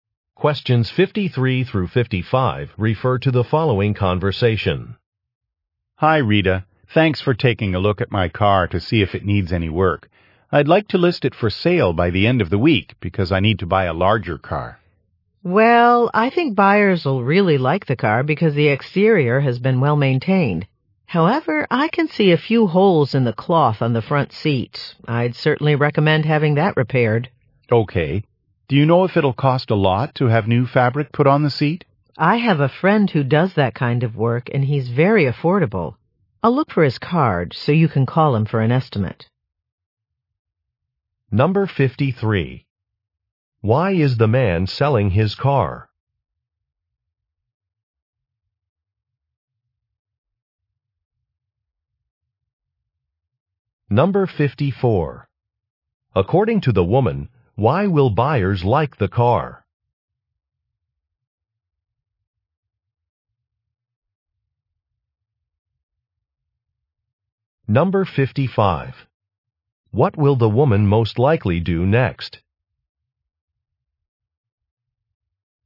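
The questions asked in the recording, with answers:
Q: Why is the man selling his car?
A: He needs a larger car

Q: According to the woman, why will buyers like the car?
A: The exterior is well maintained

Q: What will the woman most likely do next?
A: Look for her friend's business card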